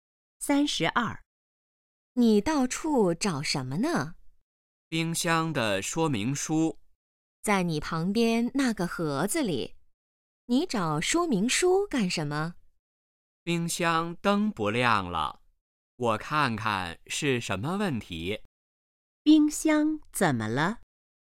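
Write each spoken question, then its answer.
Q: 冰箱怎么了?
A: 灯不亮了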